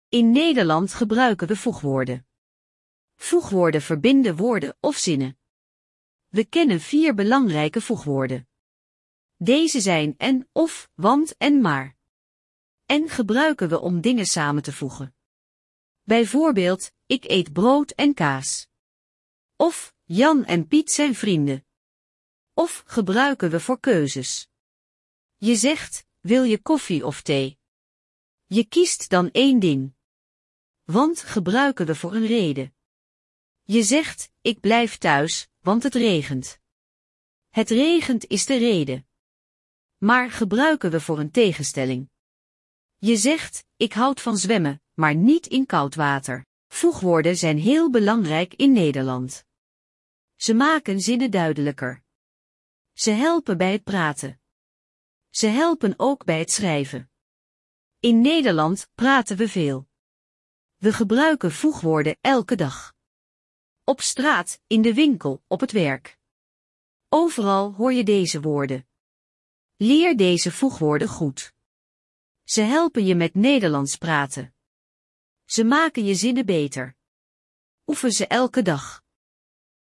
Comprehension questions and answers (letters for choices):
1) Wat doen voegwoorden?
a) Ze maken zinnen korter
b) Ze verbinden woorden of zinnen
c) Ze maken woorden langer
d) Ze veranderen de betekenis van woorden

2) Welk voegwoord gebruik je voor een keuze?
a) En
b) Of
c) Want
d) Maar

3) Wat betekent: "Ik blijf thuis, want het regent."?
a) Ik ga naar buiten als het regent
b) Ik blijf thuis omdat het regent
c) Ik houd van regen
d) Ik ga zwemmen in de regen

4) Waar hoor je voegwoorden in Nederland?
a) Alleen op het werk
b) Alleen in boeken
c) Overal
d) Alleen op school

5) Waarom zijn voegwoorden belangrijk?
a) Ze maken zinnen moeilijker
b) Ze maken zinnen duidelijker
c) Ze maken woorden korter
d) Ze veranderen de taal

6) Welk voegwoord gebruik je voor een tegenstelling?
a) En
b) Of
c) Want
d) Maar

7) Hoe vaak gebruiken Nederlanders voegwoorden?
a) Nooit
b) Soms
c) Elke week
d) Elke dag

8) Wat verbind je met 'en'?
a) Een keuze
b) Een reden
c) Dingen die samengaan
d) Een tegenstelling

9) Waar helpen voegwoorden bij?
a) Alleen bij praten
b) Alleen bij schrijven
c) Bij praten en schrijven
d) Bij rekenen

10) Wat moet je doen met voegwoorden?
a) Vergeten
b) Alleen lezen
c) Goed leren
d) Niet gebruiken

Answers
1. b
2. b
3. b
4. c
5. b
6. d
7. d
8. c
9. c
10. c

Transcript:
In Nederland gebruiken we voegwoorden. Voegwoorden verbinden woorden of zinnen. We kennen vier belangrijke voegwoorden. Deze zijn 'en', 'of', 'want' en 'maar'.
'En' gebruiken we om dingen samen te voegen. Bijvoorbeeld: "Ik eet brood en kaas." Of: "Jan en Piet zijn vrienden."
'Of' gebruiken we voor keuzes. Je zegt: "Wil je koffie of thee?" Je kiest dan één ding.
'Want' gebruiken we voor een reden. Je zegt: "Ik blijf thuis, want het regent." Het regent is de reden.
Je zegt: "Ik houd van zwemmen, maar niet in koud water."
Voegwoorden zijn heel belangrijk in Nederland. Ze helpen bij het praten. Ze helpen ook bij het schrijven.
In Nederland praten we veel. We gebruiken voegwoorden elke dag. Op straat, in de winkel, op het werk. Overal hoor je deze woorden.
Leer deze voegwoorden goed. Ze helpen je met Nederlands praten. Ze maken je zinnen beter. Oefen ze elke dag.

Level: A1-A2